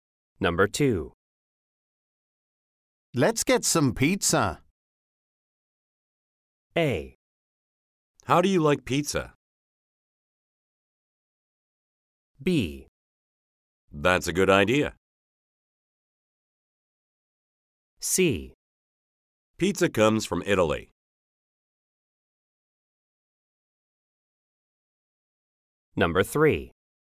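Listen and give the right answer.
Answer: B: That's a good idea.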